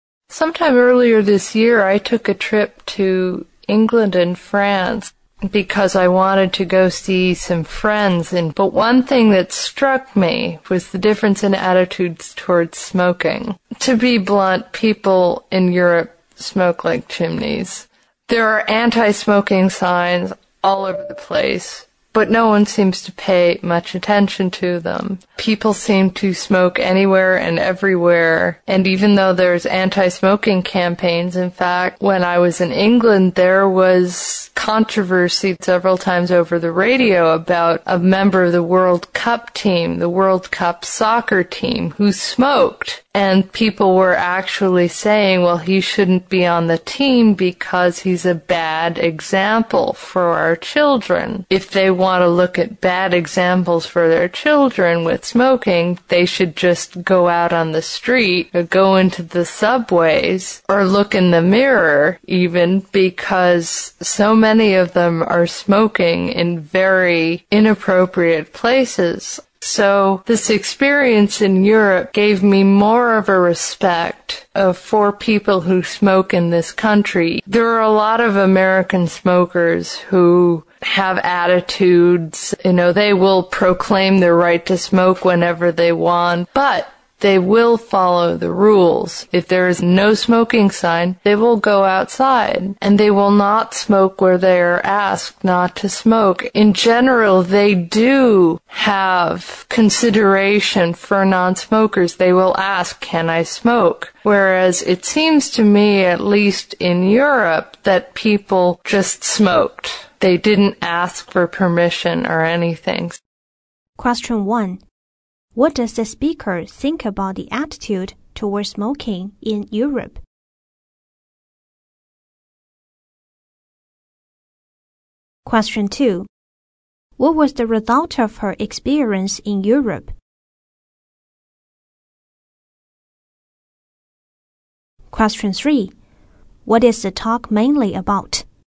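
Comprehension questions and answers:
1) What does the speaker think about the attitudes toward smoking in Europe?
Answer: That smokers ignore the rules.

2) What was the result of her experience in Europe?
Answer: It made her respect smokers in the United States.

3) What is the talk mainly about?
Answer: How the speaker's attitude changed.

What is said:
Sometime earlier this year I took a trip to England and France because I wanted to go see some friends in France. But one thing that struck me very much was the difference in attitudes towards smoking. To be blunt, people in Europe smoke like chimneys. There are antismoking signs all over the place, but no one seems to pay much attention to them. People seem to smoke anywhere and everywhere, and even though there's antismoking campaigns. In fact, when I was in England there was controversy several times over the radio about, a member of the world cup team, the world cup soccer team, who smoked. 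And people were actually saying, "Well, he shouldn't be on the team because he's a bad example for our children." If they want to look at bad examples for their children with smoking, they should just go out on the street, or go into the subways, or look in the mirror, even, because so many of them are smoking in very inappropriate places.
So this experience in Europe give me more over respect for people who smoke in this country. There are a lot of American smokers who have attitudes, you know, they will proclaim their right to smoke whenever they want. But they will follow the rules. If there is a no smoking sign, they will go outside. And they will not smoke where they're asked not to smoke. In general, they do have consideration for nonsmokers. They will ask "can I smoke?" Whereas it seems to me at least in Europe that people, just smoked. They didn't ask for permission or anything.

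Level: 英语四级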